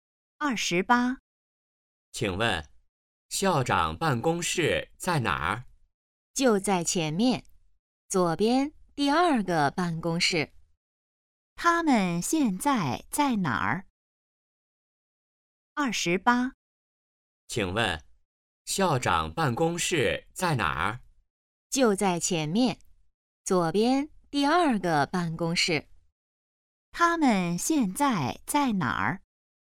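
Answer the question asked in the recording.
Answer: 学校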